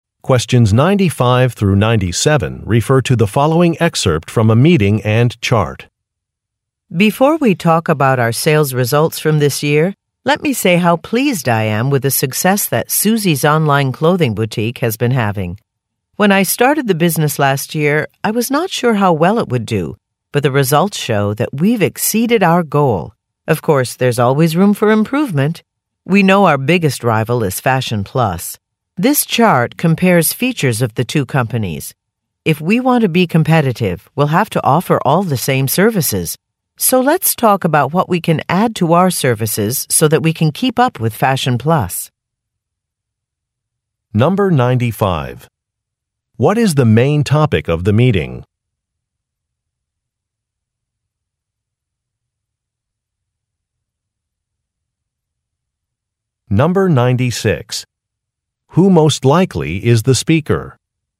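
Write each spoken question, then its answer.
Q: Who most likely is the speaker?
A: The owner of the online clothing boutique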